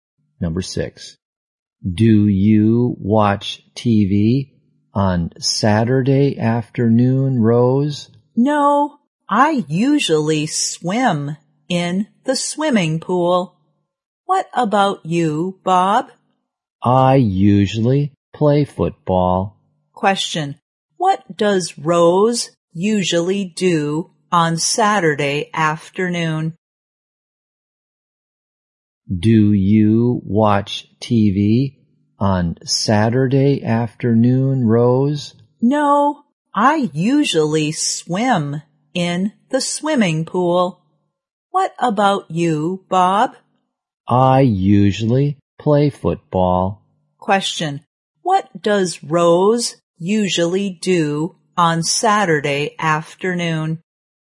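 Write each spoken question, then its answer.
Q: What does Rose usually do on Saturday afternoon?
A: She swims in the swimming pool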